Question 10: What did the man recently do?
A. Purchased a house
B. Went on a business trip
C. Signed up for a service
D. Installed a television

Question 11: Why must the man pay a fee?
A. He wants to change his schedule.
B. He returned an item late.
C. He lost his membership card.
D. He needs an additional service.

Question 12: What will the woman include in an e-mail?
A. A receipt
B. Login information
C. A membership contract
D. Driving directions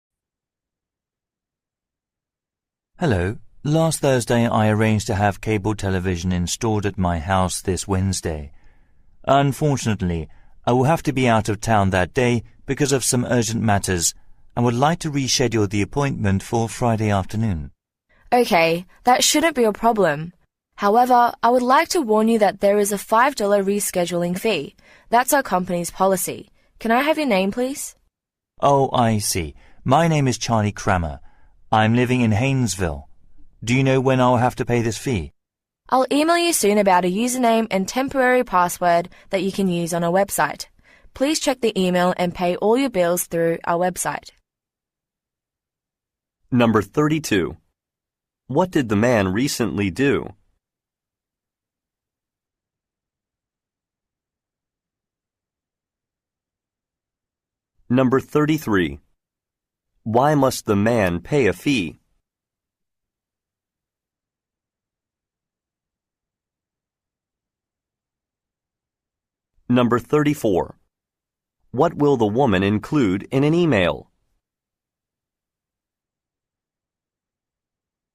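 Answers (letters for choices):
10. C
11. A
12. B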